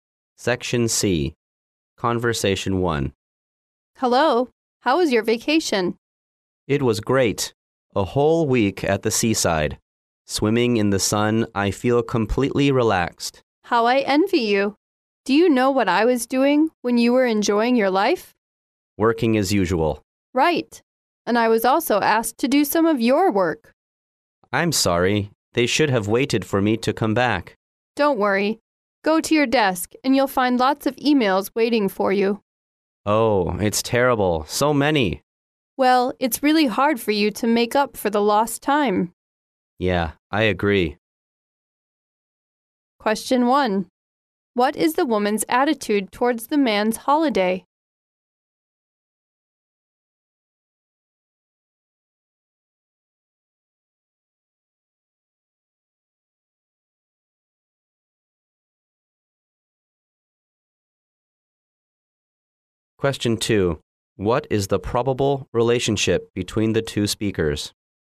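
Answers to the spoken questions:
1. She envies him
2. Colleagues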